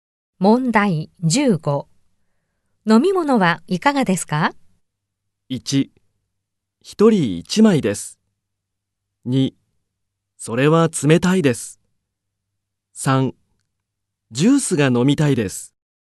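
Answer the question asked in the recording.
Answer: 3: ジュースが飲みたいです。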